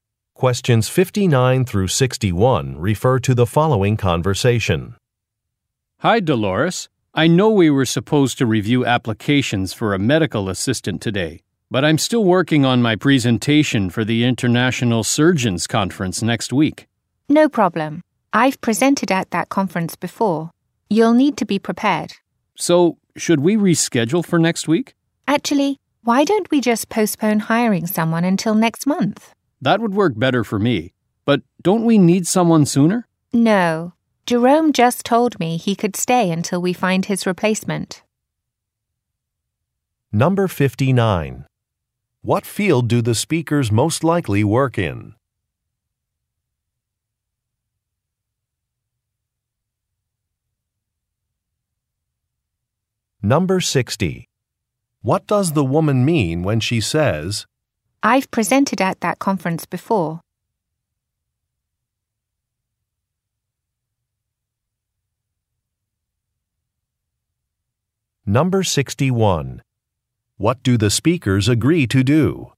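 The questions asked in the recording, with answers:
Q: What field do the speakers most likely work in?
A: Medicine

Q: What do the speakers agree to do?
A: Postpone hiring a medical assistant until next month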